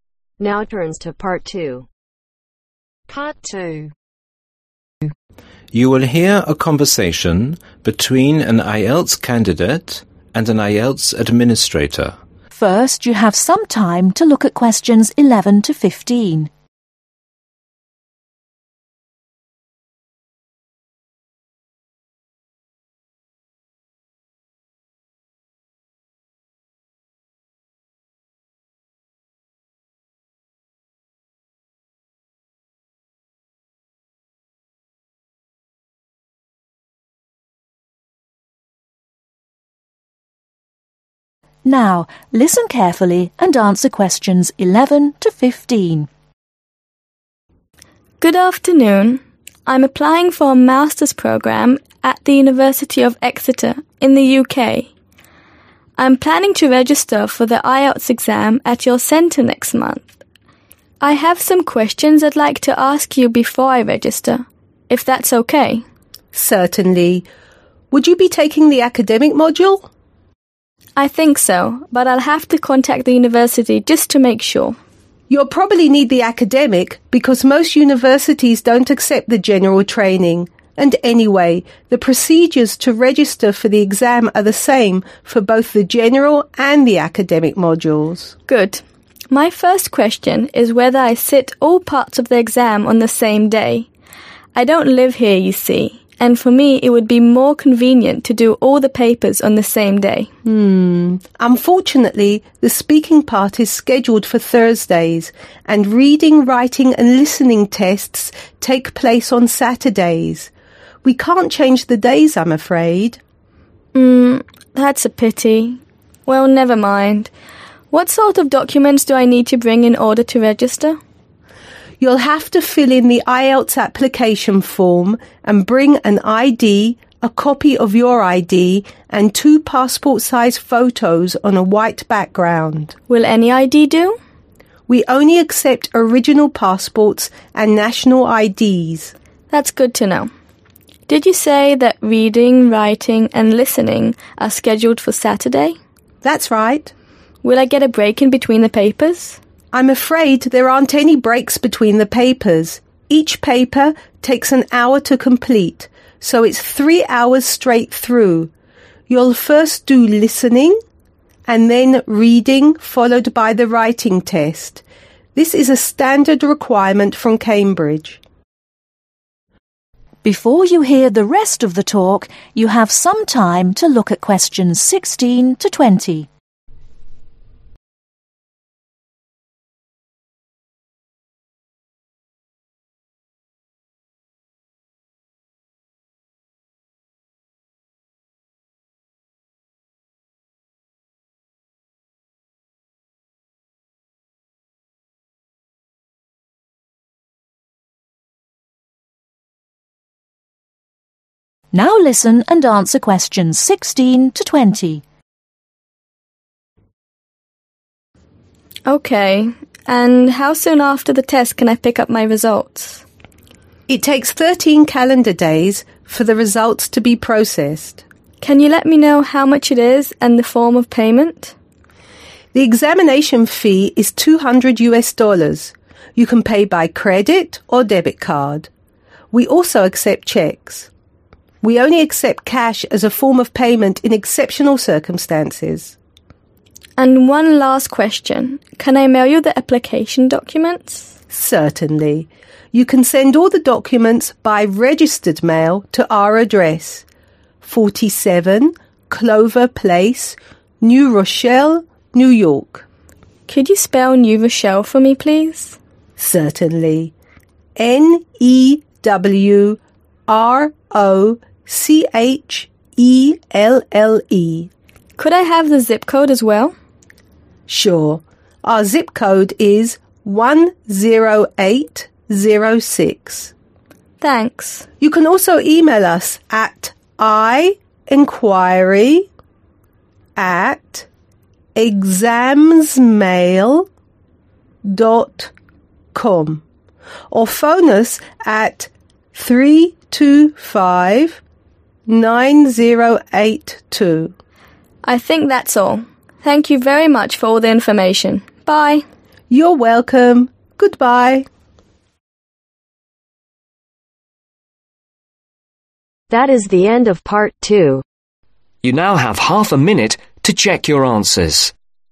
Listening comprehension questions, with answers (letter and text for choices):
Choose the correct letter, A , B or C.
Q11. Which of the statements is true ?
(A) needs to take the IELTS General module.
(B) needs to take the IELTS Academic module.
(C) is not sure which module he needs to take.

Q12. On which date would the candidate like to take the exam on ?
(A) The same day.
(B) Different day.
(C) weekends.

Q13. The listening, Reading and Writing Tests take place on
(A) Tuesday.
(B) Thursday.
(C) Saturday.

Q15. The candidate will do the Listening, Reading and Writing tests.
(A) without breaks.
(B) with one-hour breaks between tests.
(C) with 15-minute breaks between the tests.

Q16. Number of days to get results: (16)............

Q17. Test fee: (17)............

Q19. Contact email: (19) Zip ............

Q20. Contact telephone number: (20)............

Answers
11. (C) is not sure which module he needs to take.
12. (A) The same day.
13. (C) Saturday.
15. (A) without breaks.
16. 13
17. 200
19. 10806
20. 3259082